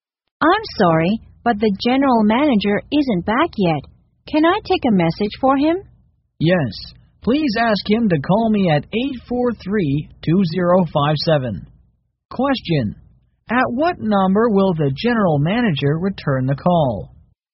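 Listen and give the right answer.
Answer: 843-2057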